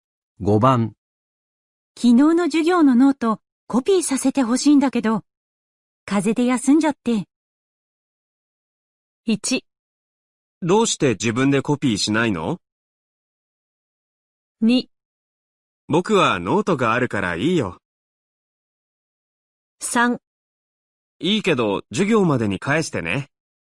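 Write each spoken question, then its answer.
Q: 昨日の授業のノートコピーさせてほしいんだけど、風邪で休んじゃって。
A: 3: いいけど授業までに返してね。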